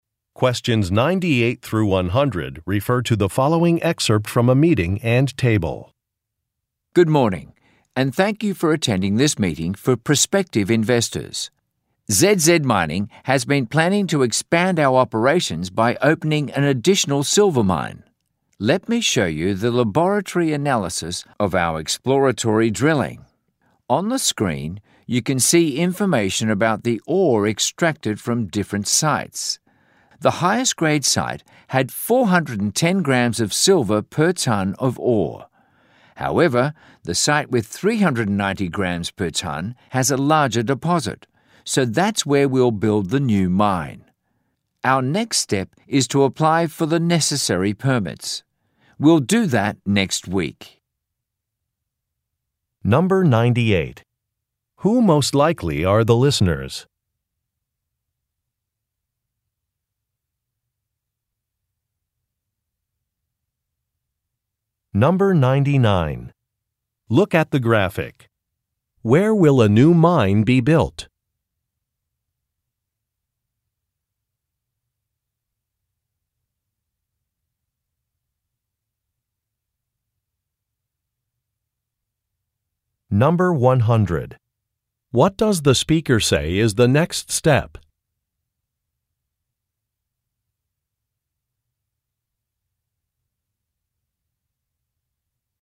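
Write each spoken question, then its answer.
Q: Who most likely are the listeners?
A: Prospective investors

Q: What does the speaker say is the next step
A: Applying for the necessary permits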